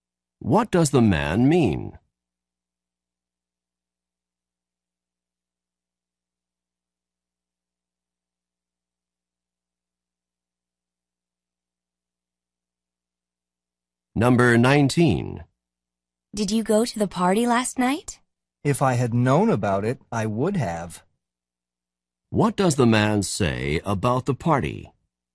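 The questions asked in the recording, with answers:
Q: What does the man say about the party?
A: He didn't go because he didn't know about it.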